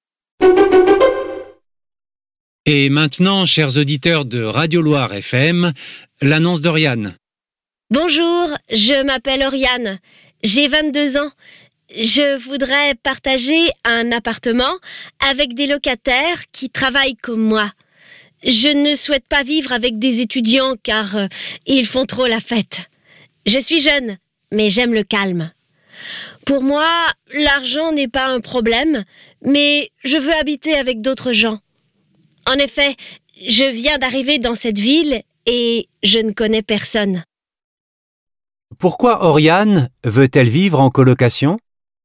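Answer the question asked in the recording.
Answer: Parce qu'elle vient d'arriver dans la ville et ne connaît personne.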